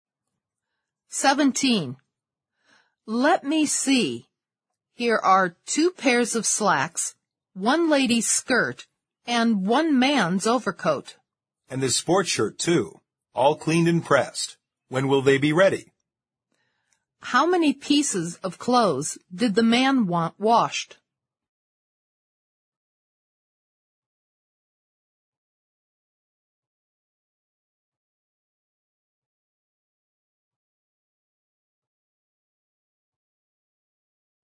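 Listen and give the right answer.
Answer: 5.

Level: 四级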